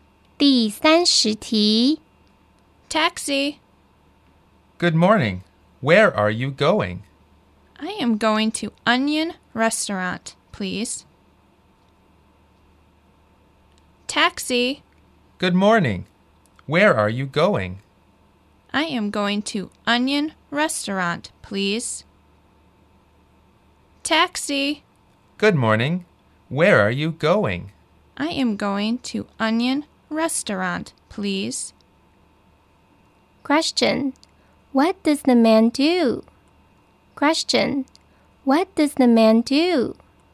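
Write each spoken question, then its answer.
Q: What does the man do?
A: He is a taxi driver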